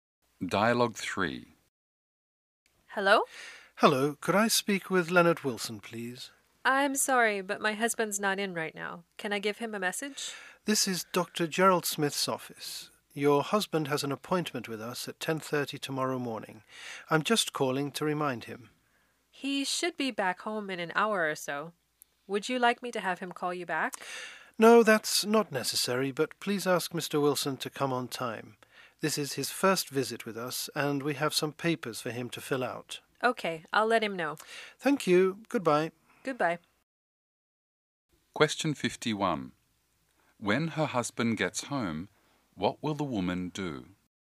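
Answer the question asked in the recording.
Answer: Remind him of his 10:30 appointment tomorrow and tell him to come on time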